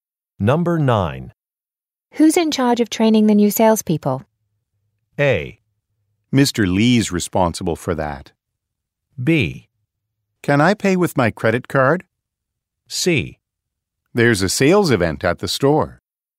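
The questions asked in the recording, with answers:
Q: Who's in charge of training the new salespeople?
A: A: Mr. Lee's responsible for that.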